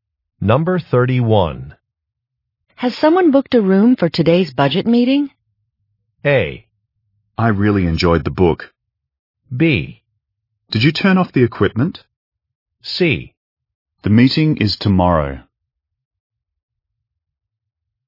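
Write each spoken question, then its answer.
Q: Has someone booked a room for today's budget meeting?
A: C: The meeting is tomorrow.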